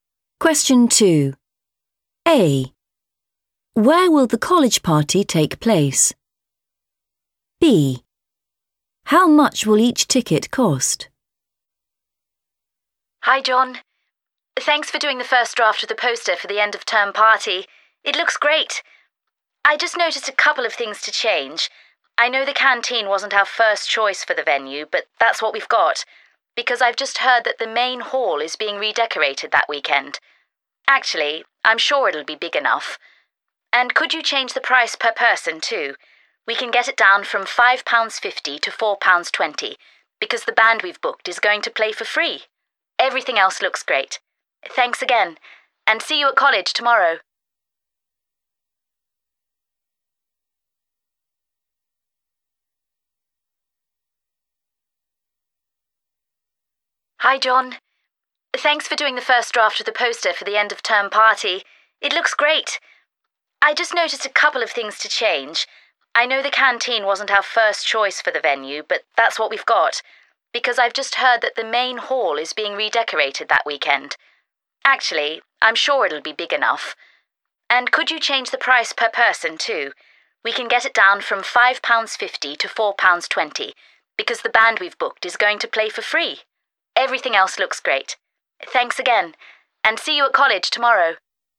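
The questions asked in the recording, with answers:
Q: Where will the college party take place?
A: the canteen

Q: How much will each ticket cost?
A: £4.20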